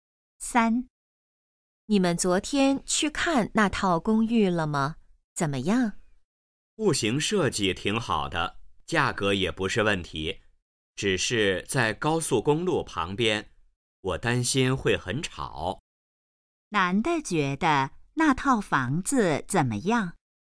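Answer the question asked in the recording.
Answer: 在高速公路旁边,可能很吵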